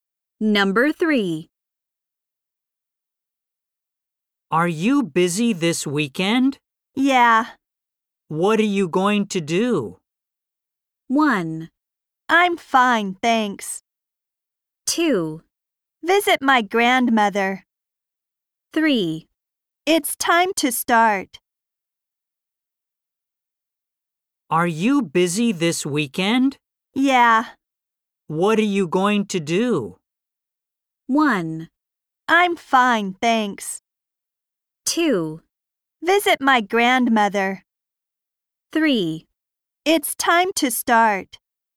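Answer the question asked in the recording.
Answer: 2: Visit my grandmother.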